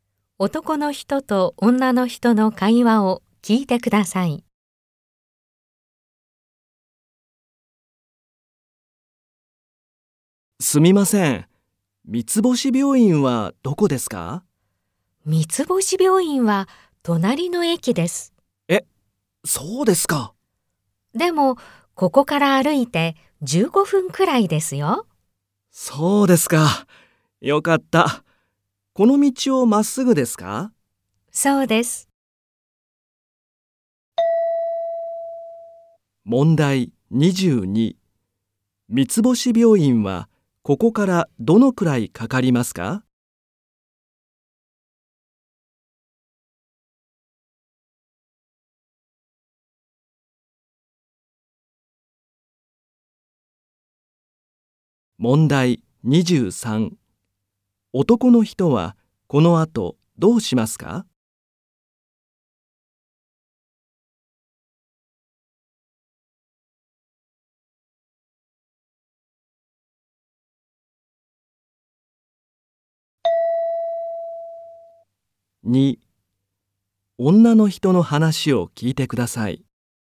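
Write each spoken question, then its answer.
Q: 三つ星病院はここからどのくらいかかりますか?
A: 歩いて15分くらい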